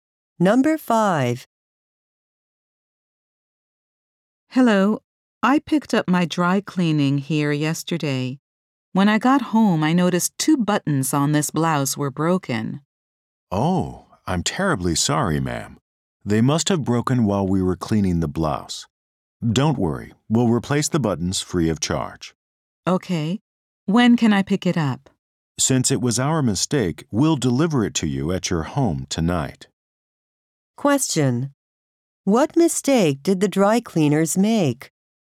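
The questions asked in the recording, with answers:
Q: What mistake did the dry cleaners make?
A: They broke two buttons on the woman's blouse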